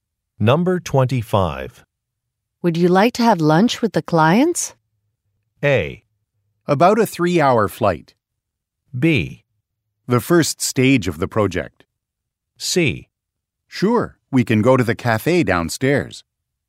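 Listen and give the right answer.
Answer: C: Sure, we can go to the cafe downstairs.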